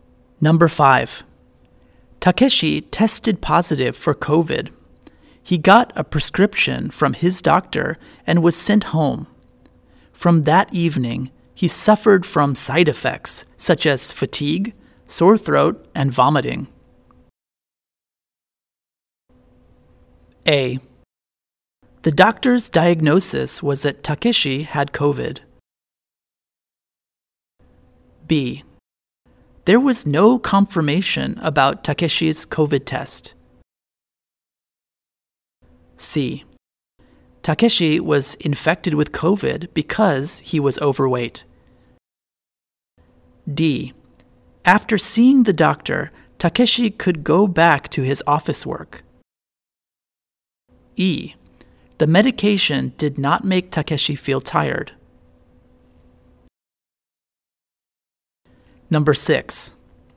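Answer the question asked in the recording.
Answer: A: The doctor's diagnosis was that Takeshi had COVID.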